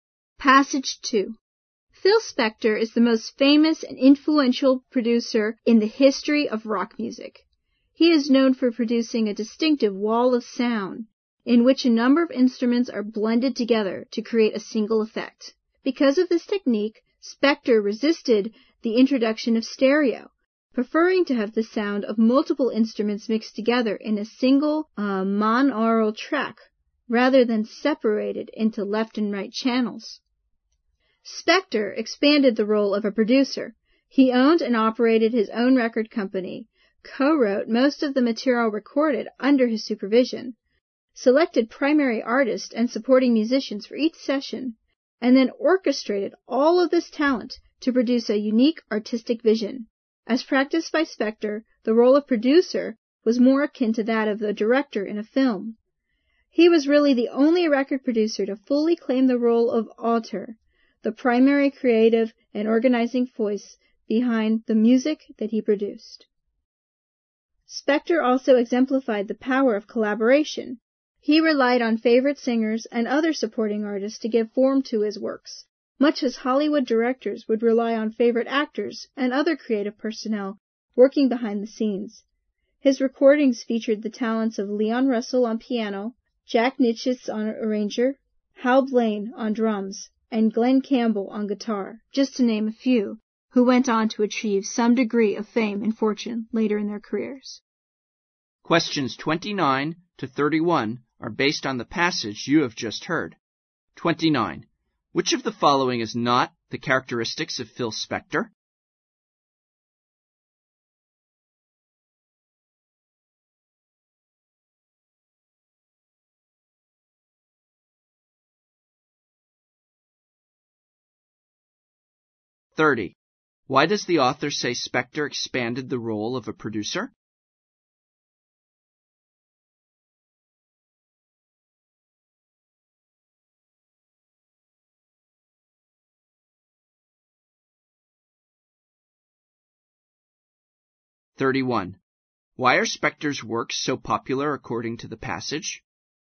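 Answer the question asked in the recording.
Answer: Because he owned his own record company, co-wrote most of the material, chose the artists and orchestrated everything.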